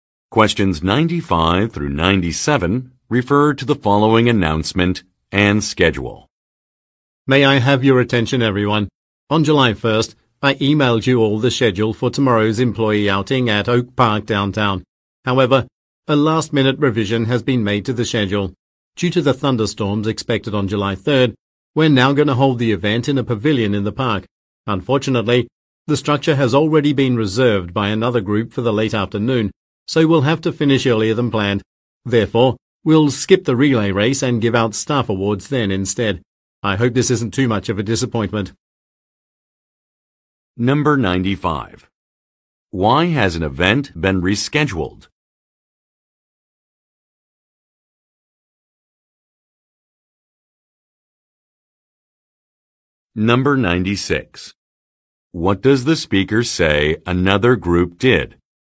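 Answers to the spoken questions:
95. Because thunderstorms are expected
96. Reserved the pavilion for the late afternoon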